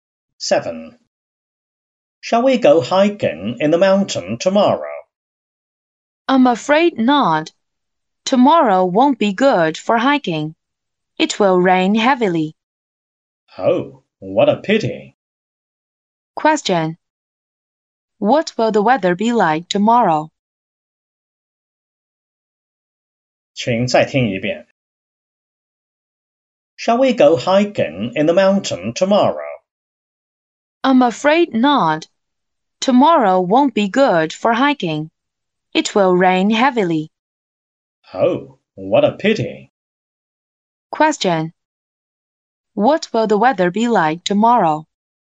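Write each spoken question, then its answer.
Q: What will the weather be like tomorrow?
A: It will rain heavily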